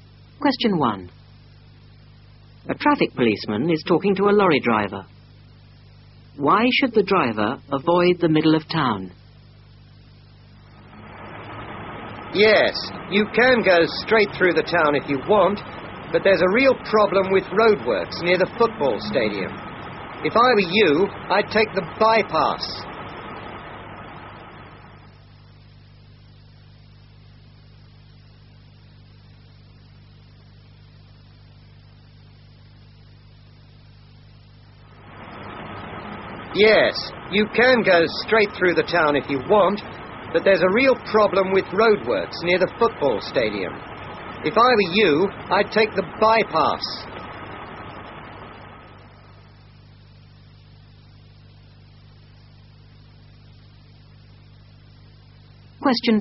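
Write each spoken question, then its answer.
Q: Why should the driver avoid the middle of town?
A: There are roadworks near the football stadium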